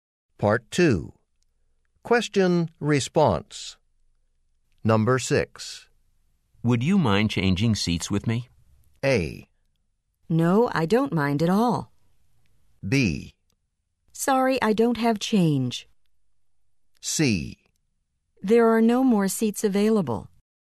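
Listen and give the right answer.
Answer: A: No, I don't mind at all.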